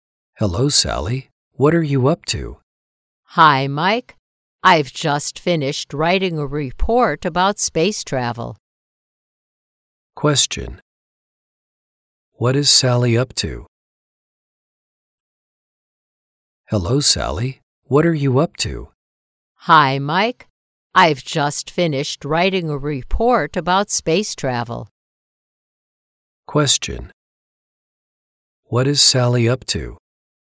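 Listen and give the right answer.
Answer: She has just finished writing a report about space travel.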